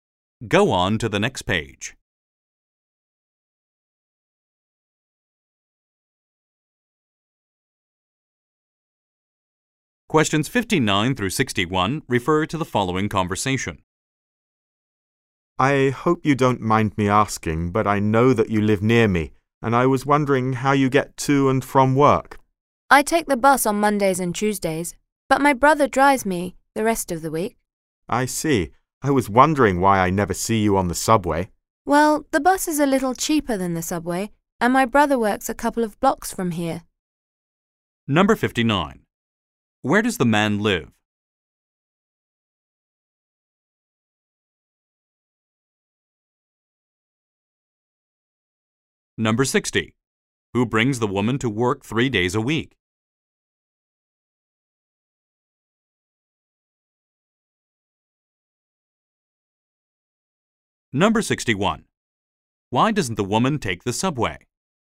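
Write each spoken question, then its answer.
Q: Where does the man live?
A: Near the woman

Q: Who brings the woman to work 3 days a week?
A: Her brother

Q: Why doesn't the woman take the subway?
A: The bus is cheaper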